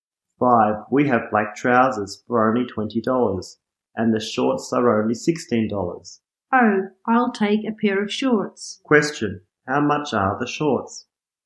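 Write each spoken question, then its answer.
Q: How much are the shorts?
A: $16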